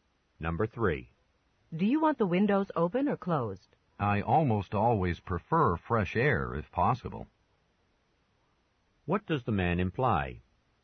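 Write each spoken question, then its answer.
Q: What does the man imply?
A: He wants the windows open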